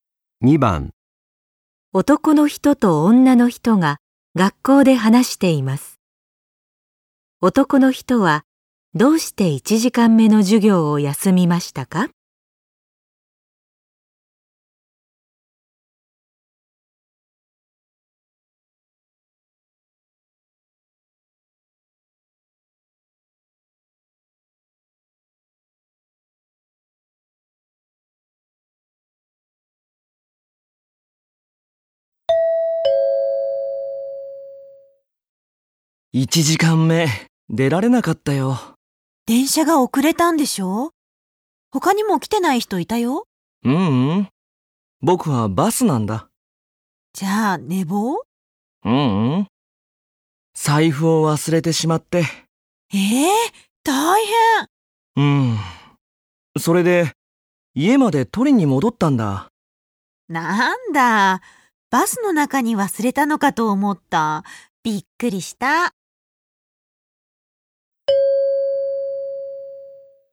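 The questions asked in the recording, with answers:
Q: 男の人はどうして1時間目の授業を休みましたか?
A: 財布を忘れて家まで取りに戻ったから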